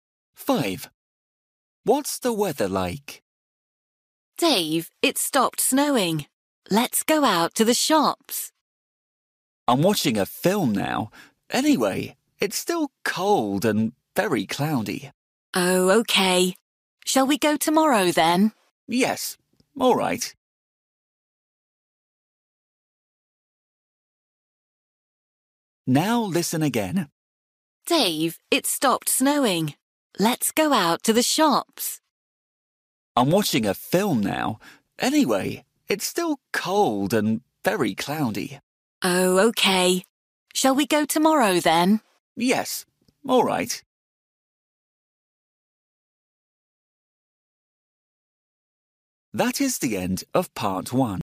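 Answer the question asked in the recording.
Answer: Cold and cloudy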